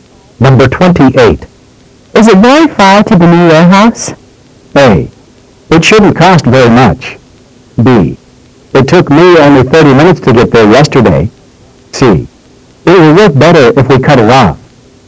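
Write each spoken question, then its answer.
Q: Is it very far to the new warehouse?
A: B: It took me only 30 minutes to get there yesterday.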